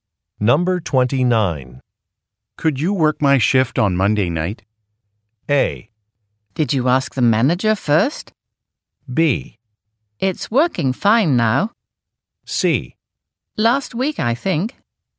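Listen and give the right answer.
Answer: A: Did you ask the manager first?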